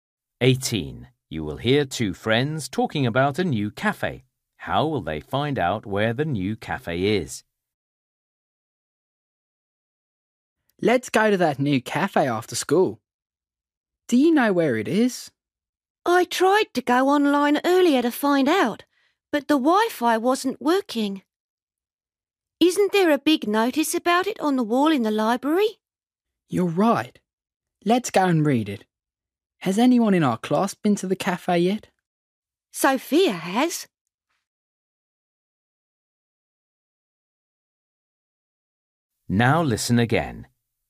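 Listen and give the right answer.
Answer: By reading a notice on the wall in the library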